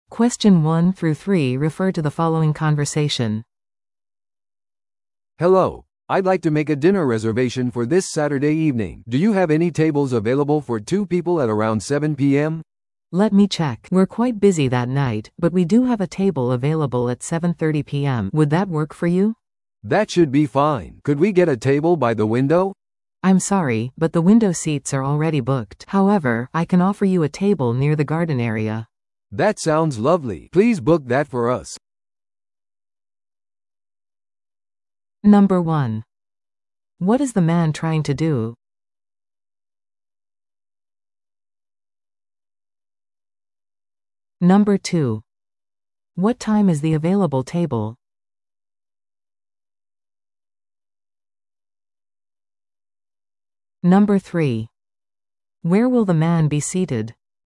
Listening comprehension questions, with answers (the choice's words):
Listen to the audio below and answer the questions.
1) What is the man trying to do?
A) ホテルの部屋を予約する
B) レストランのディナー予約をする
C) 食事のデリバリーを注文する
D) 予約をキャンセルする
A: レストランのディナー予約をする

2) What time is the available table?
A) 午後6時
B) 午後7時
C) 午後7時30分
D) 午後8時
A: 午後7時30分

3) Where will the man be seated?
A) 窓際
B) 入口付近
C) 個室のダイニングルーム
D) ガーデンエリアの近く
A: ガーデンエリアの近く

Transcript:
A: "Hello, I'd like to make a dinner reservation for this Saturday evening. Do you have any tables available for two people at around 7 PM?"
B: "Let me check... We're quite busy that night, but we do have a table available at 7:30 PM. Would that work for you?"
A: "That should be fine. Could we get a table by the window?"
B: "I'm sorry, but the window seats are already booked. However, I can offer you a table near the garden area."
A: "That sounds lovely! Please book that for us."